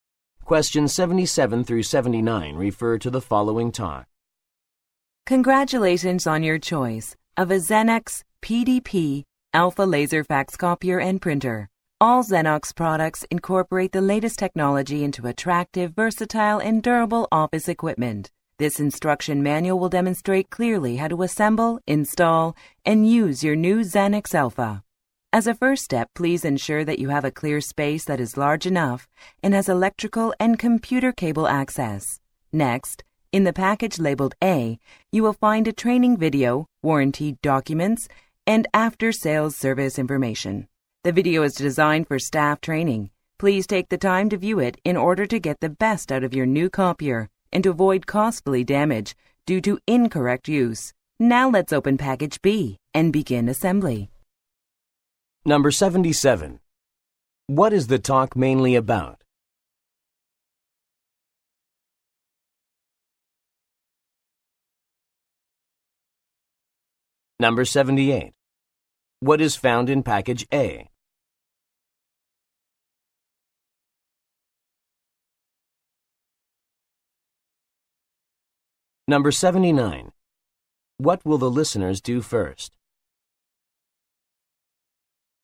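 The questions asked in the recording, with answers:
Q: What is the talk mainly about?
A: Instructions for setting up and using a new fax copier and printer

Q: What is found in package A?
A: A training video, warranty documents and after-sales service information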